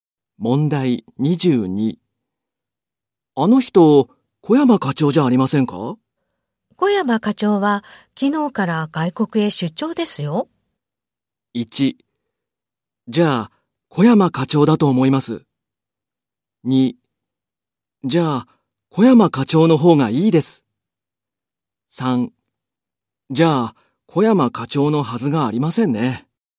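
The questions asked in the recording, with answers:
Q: あの人、小山課長じゃありませんか?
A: 3: じゃあ、小山課長のはずがありませんね。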